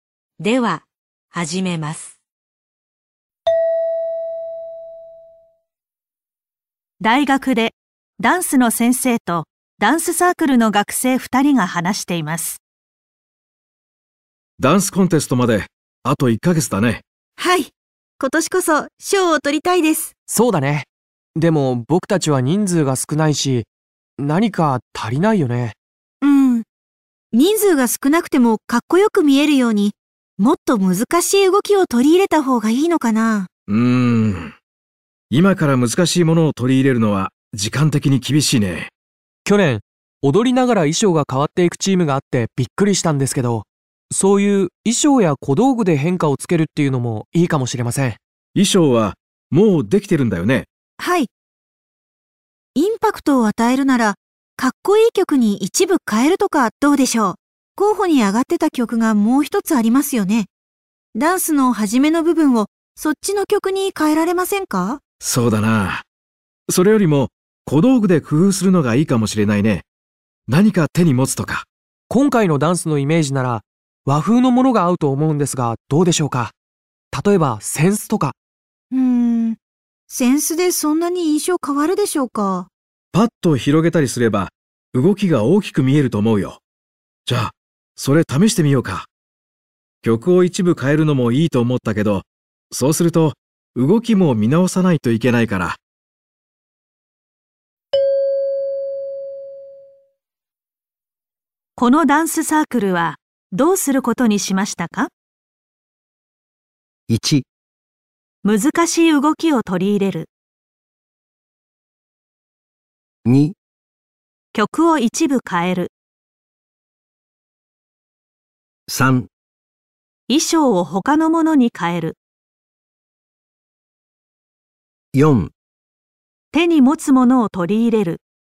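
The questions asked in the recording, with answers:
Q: このダンスサークルはどうすることにしましたか?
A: 4: 手に持つものを取り入れる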